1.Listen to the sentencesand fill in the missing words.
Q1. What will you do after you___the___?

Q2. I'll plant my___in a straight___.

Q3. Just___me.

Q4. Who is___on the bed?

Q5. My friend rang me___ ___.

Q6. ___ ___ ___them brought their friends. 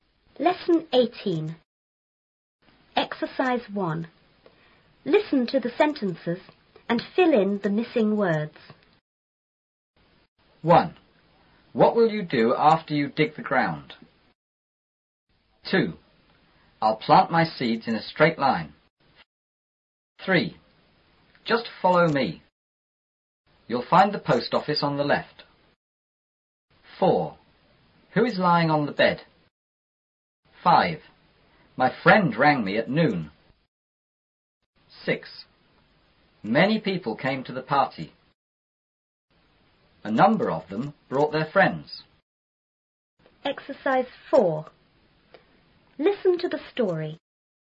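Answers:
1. dig; ground
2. seeds; line
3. follow (You'll find the post office)
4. lying
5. at noon
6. A number of

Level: 初中英语广州版4B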